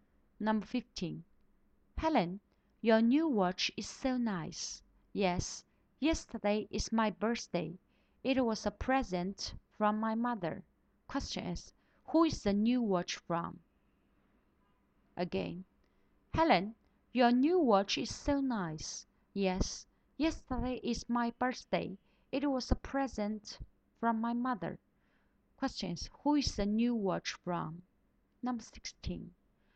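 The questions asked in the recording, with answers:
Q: Question is, who is the new watch from?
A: Her mother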